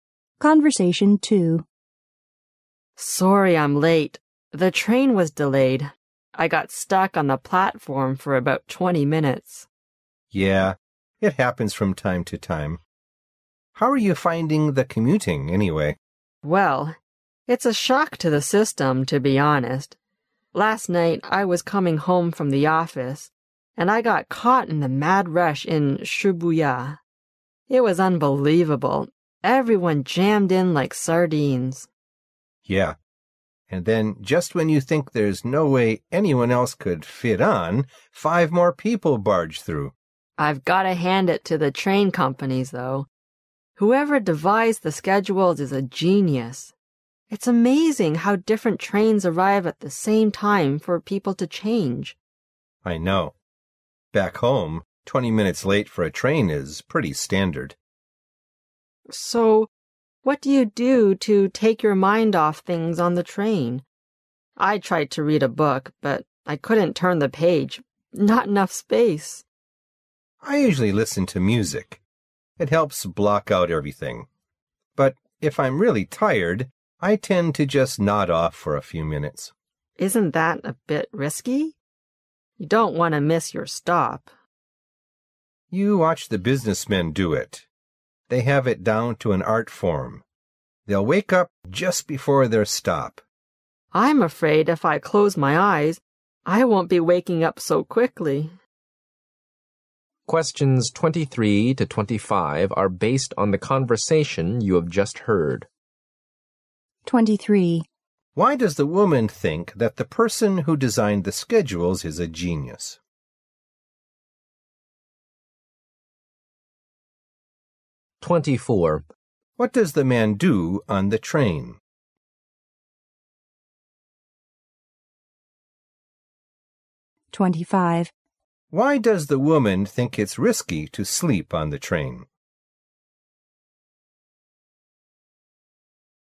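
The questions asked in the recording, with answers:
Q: Why does the woman think that the person who designed the schedules is a genius?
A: Because different trains arrive at the same time so people can change trains.

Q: Why does the woman think it's risky to sleep on the train?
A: Because you might miss your stop.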